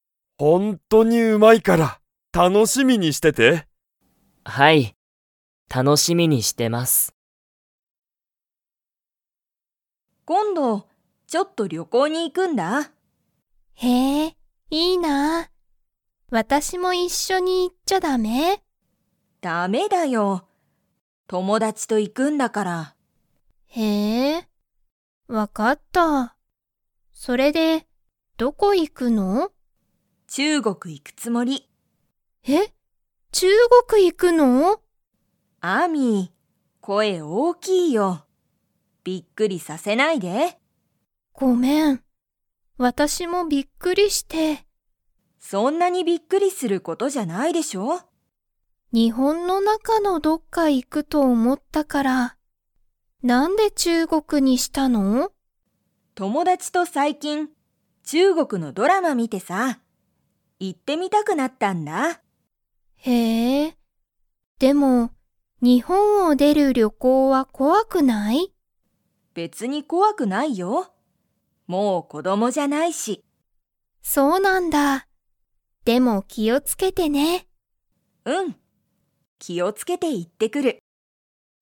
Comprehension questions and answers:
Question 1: カオリは、誰(だれ)と旅行(りょこう)に行(い)きますか?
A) アミ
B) アミの友達(ともだち)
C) カオリの友達(ともだち)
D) お母(かあ)さん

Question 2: カオリは日本(にほん)を出(で)る旅行(りょこう)が 。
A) 怖(こわ)い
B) 怖(こわ)くない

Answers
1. C
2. B

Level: Level 3

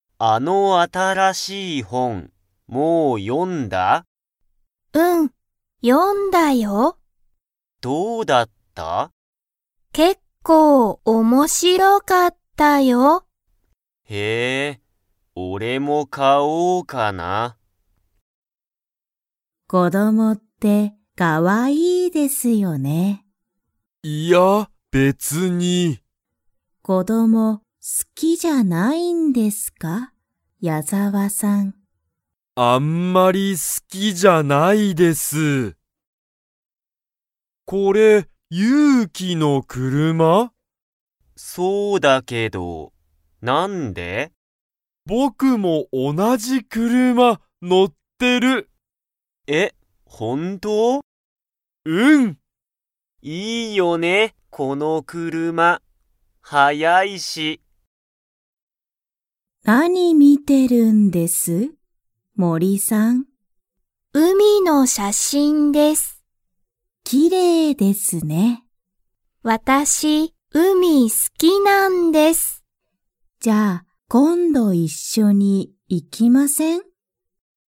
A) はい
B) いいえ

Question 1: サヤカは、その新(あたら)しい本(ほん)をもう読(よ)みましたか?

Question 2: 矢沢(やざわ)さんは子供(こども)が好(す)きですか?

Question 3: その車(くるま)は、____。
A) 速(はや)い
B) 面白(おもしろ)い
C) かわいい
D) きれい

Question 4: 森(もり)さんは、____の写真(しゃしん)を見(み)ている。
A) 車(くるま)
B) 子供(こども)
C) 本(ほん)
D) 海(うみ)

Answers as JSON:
{"1": "A", "2": "B", "3": "A", "4": "D"}

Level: Level 1

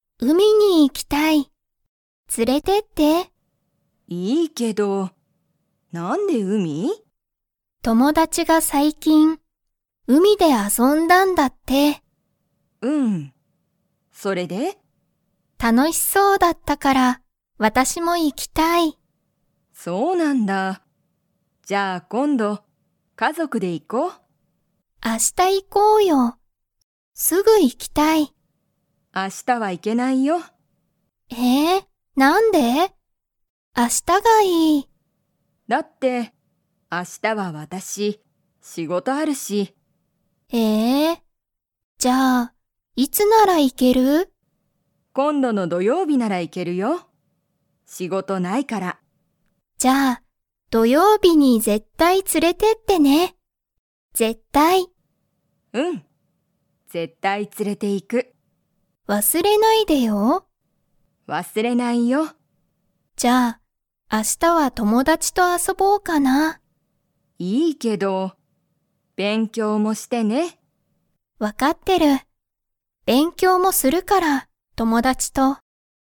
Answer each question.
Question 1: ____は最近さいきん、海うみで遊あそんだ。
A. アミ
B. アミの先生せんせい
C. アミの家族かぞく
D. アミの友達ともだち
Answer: D

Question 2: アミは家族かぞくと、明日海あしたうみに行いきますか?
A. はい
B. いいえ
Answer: B

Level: Level 2

